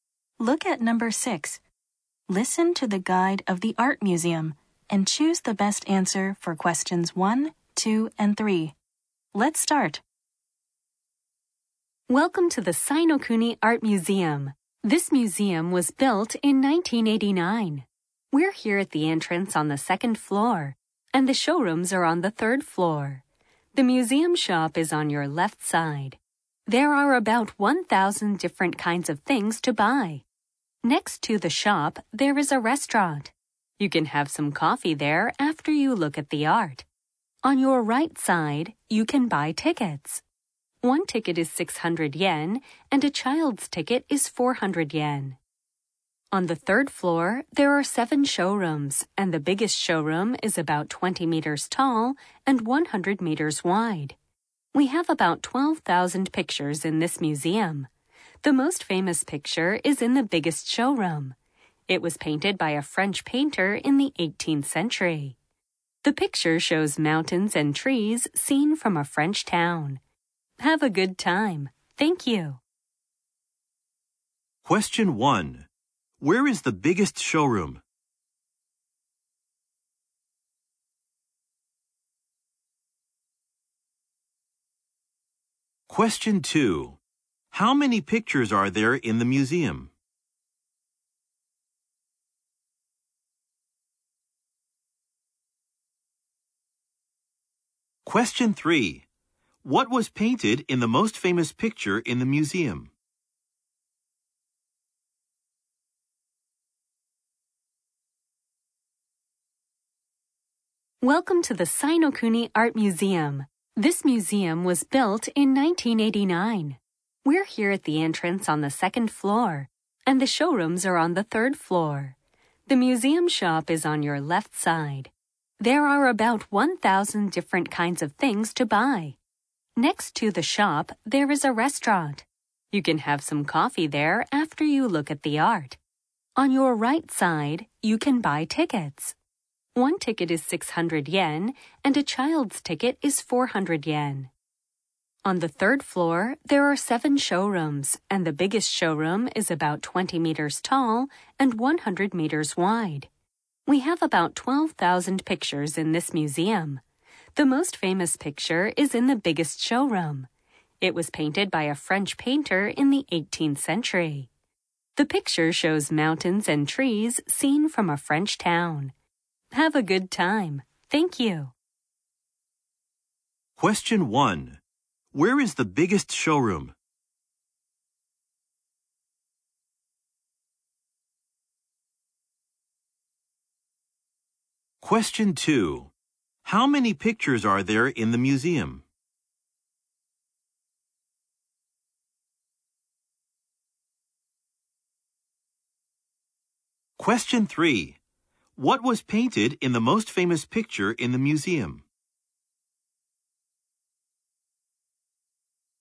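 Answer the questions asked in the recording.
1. On the third floor
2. About 12,000
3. Mountains and trees seen from a French town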